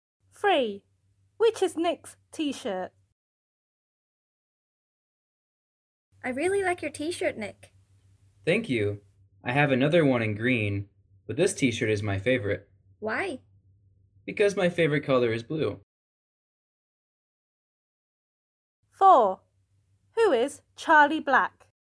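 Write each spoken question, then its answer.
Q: Which is Nick's t-shirt?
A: The blue one.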